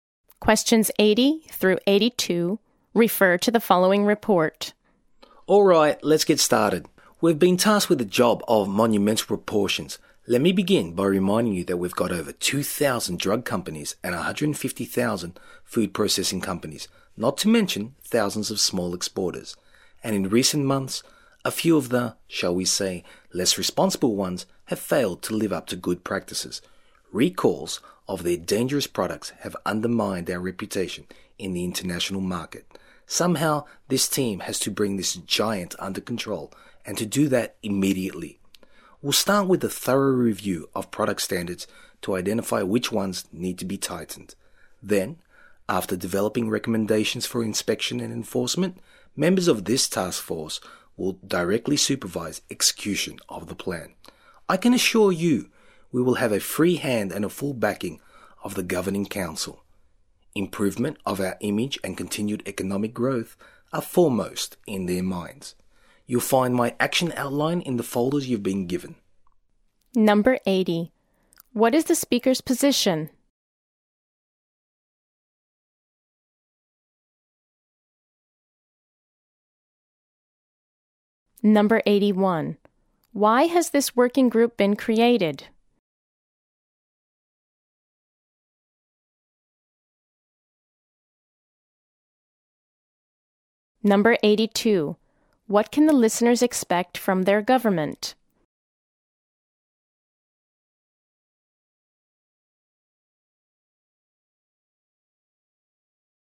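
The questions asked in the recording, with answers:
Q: Why has this working group been created?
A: To tighten product standards and enforcement after dangerous product recalls

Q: What can the listeners expect from their government?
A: A free hand and full backing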